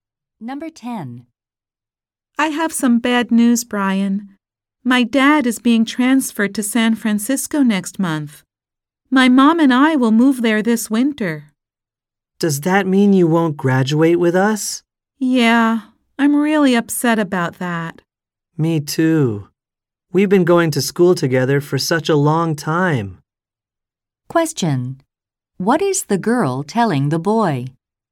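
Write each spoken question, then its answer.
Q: What is the girl telling the boy?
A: She is moving to San Francisco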